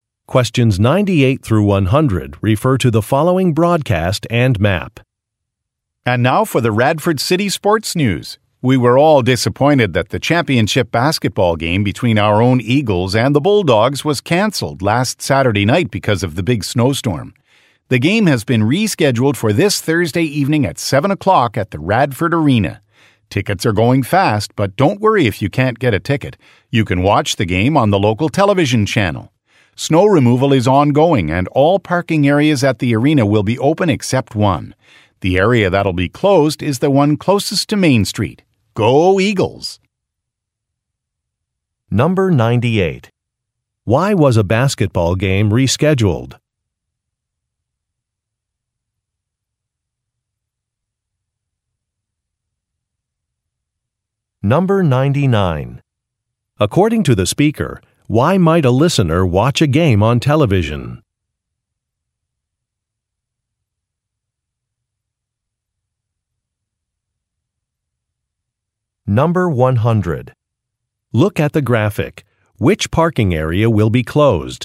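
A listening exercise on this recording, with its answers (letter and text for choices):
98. Why was a basketball game rescheduled?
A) Some players were ill.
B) A team bus broke down.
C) The arena was being repaired.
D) The weather was bad.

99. According to the speaker, why might a listener watch a game on television?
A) If a snowstorm is predicted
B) If tickets have been sold out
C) If there is no available parking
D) If the game is being played out of town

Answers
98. D) The weather was bad.
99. B) If tickets have been sold out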